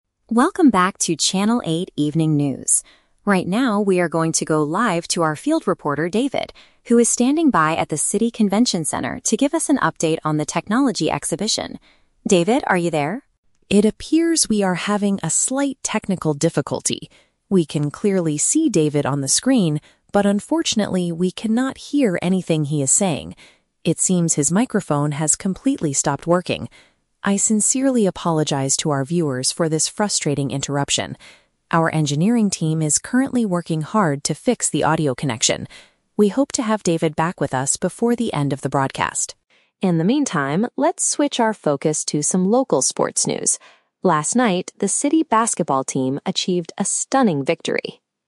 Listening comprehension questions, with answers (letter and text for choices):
Listen to a news anchor making an announcement on live television. Choose the correct answer (A, B, or C) for each question.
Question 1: What is the main problem with the live broadcast?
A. The video screen suddenly went completely dark.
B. The reporter's voice cannot be heard by the viewers.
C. The studio equipment was damaged by the weather.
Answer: B. The reporter's voice cannot be heard by the viewers.

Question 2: What is the technical staff doing right now?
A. They are trying to repair the sound issue.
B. They are driving to the location to replace a camera.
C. They are answering phone calls from angry viewers.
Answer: A. They are trying to repair the sound issue.

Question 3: What topic will the news anchor talk about next?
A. A new technology exhibition.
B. A recent athletic event in the city.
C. The upcoming weekend weather forecast.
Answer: B. A recent athletic event in the city.

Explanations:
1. The anchor states that "we cannot hear anything he is saying" and his "microphone has completely stopped working". Option B paraphrases this accurately. Option A is the Trap: The anchor specifically says "We can clearly see David on the screen", meaning the video is working perfectly fine, only the audio is lost. Option C is not mentioned.
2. The anchor mentions that the engineering team is "working hard to fix the audio connection". Option A uses synonyms to express this (repair = fix; sound issue = audio connection). Option B is the Trap: The "Convention Center" (location) is mentioned at the beginning, but the staff is not driving there to fix a camera (the camera is working). Option C is plausible for a TV station but is not mentioned in the audio.
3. To fill the time, the anchor says "let's switch our focus to some local sports news" and talks about the "city basketball team". Option B paraphrases this perfectly (athletic event = sports news / basketball). Option A is the Trap: The "technology exhibition" is what David was going to talk about before his microphone broke. Option C is not mentioned.

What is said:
News Anchor: Welcome back to Channel 8 Evening News. Right now, we are going to go live to our field reporter, David, who is standing by at the City Convention Center to give us an update on the technology exhibition. David, are you there?
It appears we are having a slight technical difficulty. We can clearly see David on the screen, but unfortunately, we cannot hear anything he is saying. It seems his microphone has completely stopped working. I sincerely apologize to our viewers for this frustrating interruption. Our engineering team is currently working hard to fix the audio connection. We hope to have David back with us before the end of the broadcast.
In the meantime, let's switch our focus to some local sports news. Last night, the city basketball team achieved a stunning victory...